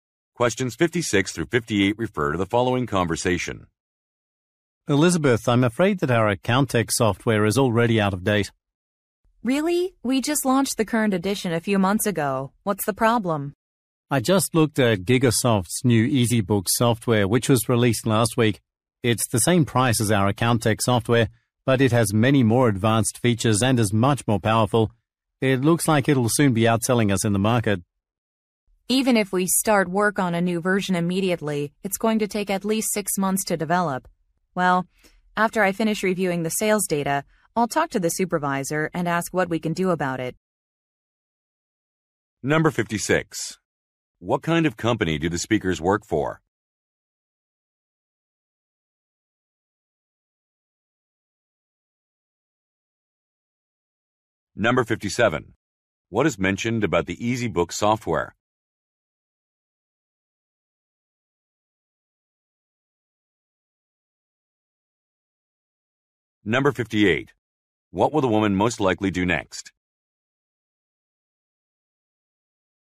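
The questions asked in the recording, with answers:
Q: What kind of company do the speakers work for?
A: A software company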